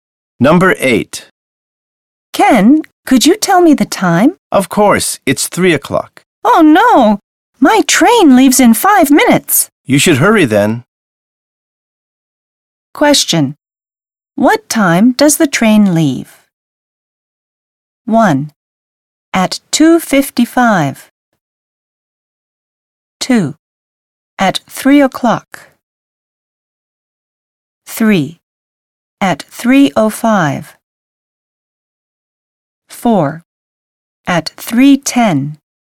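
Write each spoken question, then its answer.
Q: What time does the train leave?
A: 3: At 3:05.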